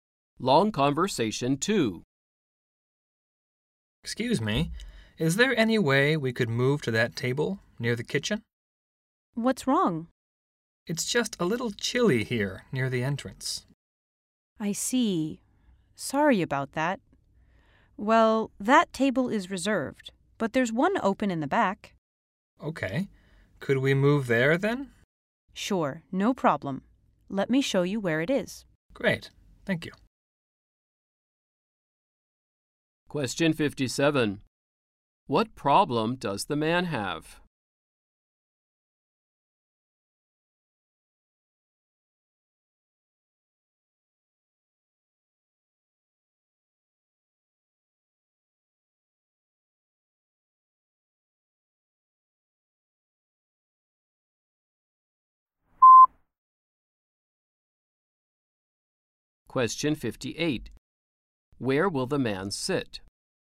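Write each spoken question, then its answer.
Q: What problem does the man have?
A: It is chilly near the entrance

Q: Where will the man sit?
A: At the open table in the back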